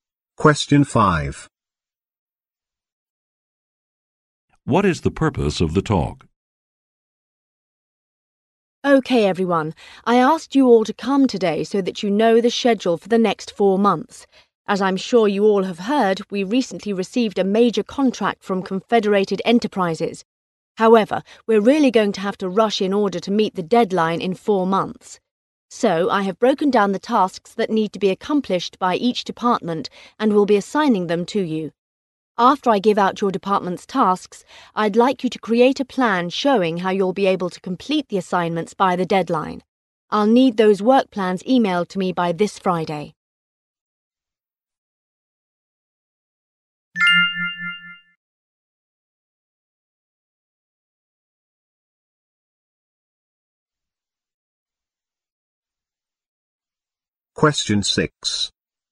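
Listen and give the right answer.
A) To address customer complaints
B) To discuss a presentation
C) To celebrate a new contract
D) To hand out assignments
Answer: D) To hand out assignments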